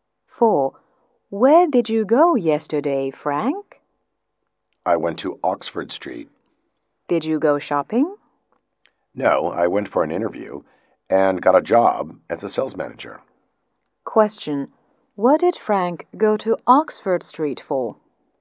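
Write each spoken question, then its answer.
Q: What did Frank go to Oxford Street for?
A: For a job interview.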